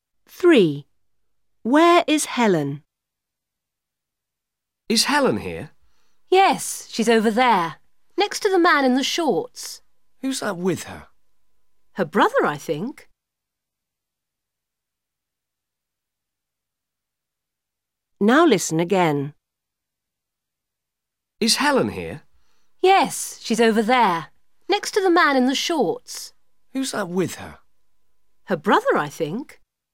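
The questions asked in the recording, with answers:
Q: Where is Helen?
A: Next to the man in the shorts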